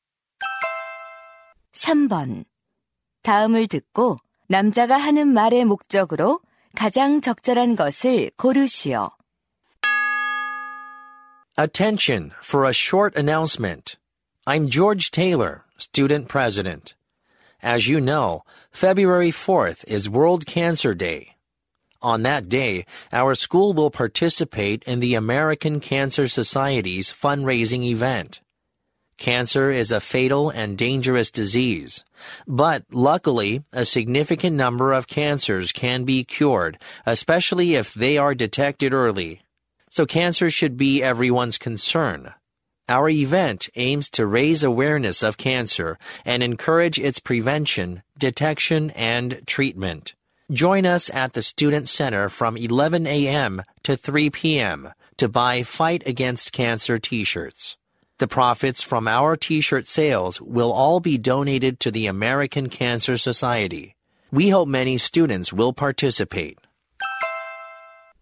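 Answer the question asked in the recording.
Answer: 암 퇴치 기금 모금 행사 참여 독려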